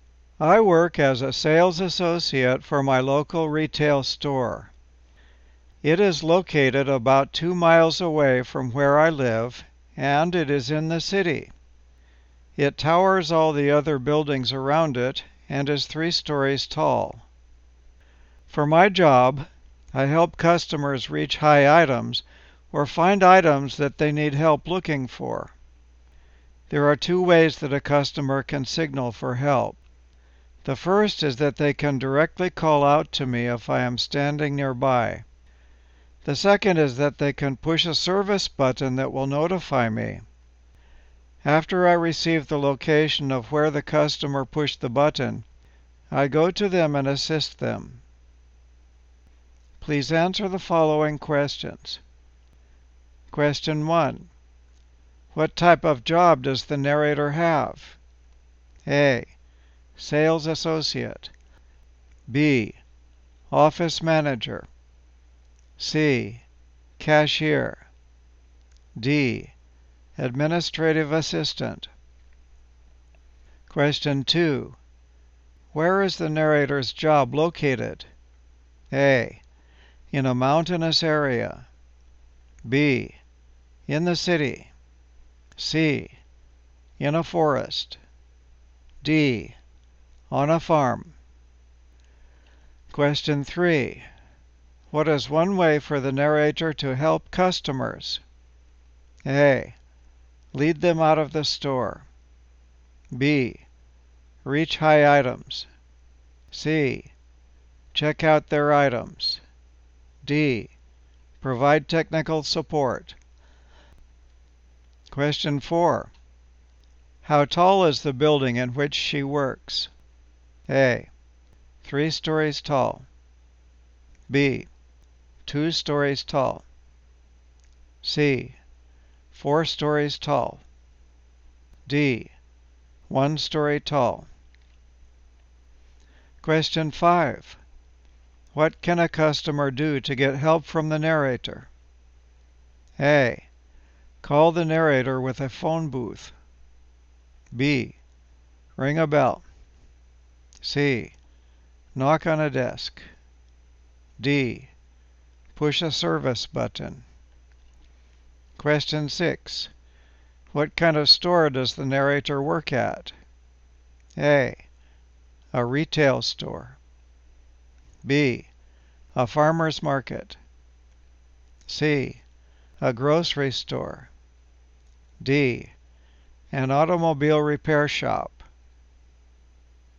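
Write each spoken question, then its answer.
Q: What type of job does the narrator have?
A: A: Sales associate.

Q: Where is the narrator's job located?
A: B: In the city.

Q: What is one way for the narrator to help customers?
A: B: Reach high items.

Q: How tall is the building in which she works?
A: A: 3 stories tall.

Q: What can a customer do to get help from the narrator?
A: D: Push a service button.

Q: What kind of store does the narrator work at?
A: A: A retail store.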